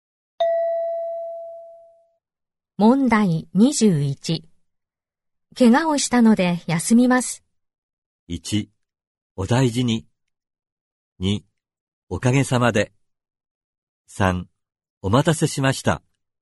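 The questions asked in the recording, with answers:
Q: 怪我をしたので休みます。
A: 1: お大事に。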